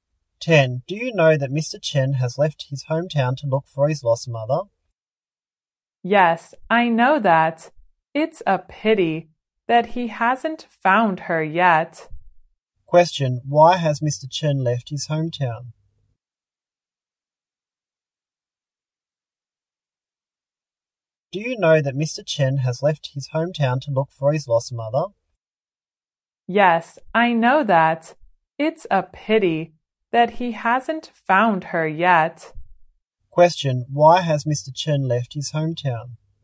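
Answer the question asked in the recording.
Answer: To look for his lost mother.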